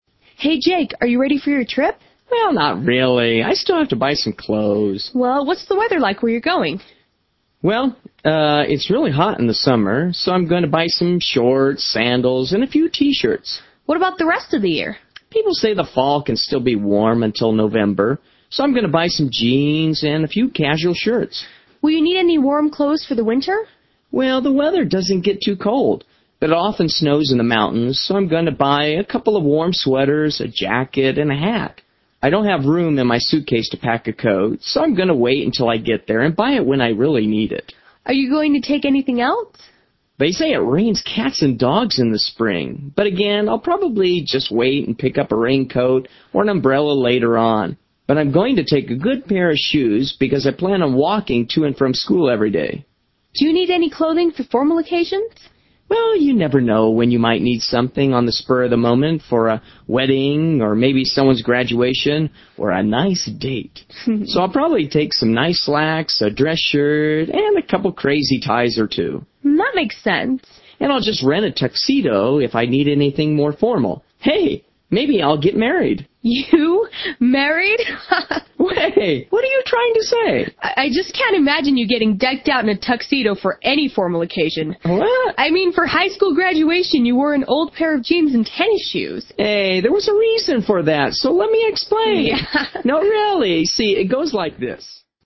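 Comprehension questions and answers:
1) What does the man plan to wear during the summer months?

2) What is one thing the man is NOT going to pack for the winter season?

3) What is the weather like in the spring?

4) What is an example of an occasion where the man might need formal clothes?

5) What did the man wear to his high school graduation?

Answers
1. shorts, sandals, and a few t-shirts
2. a coat
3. It rains a lot
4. a wedding
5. an old pair of jeans and tennis shoes

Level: 7 "А", "В", "Г", "Е"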